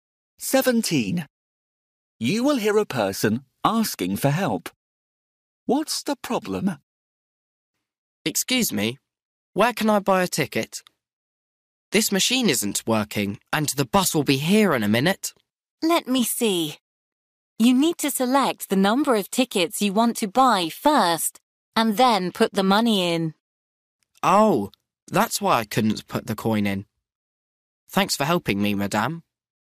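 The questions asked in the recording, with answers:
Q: What's the problem?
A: He couldn't put the coin in because he didn't select the number of tickets first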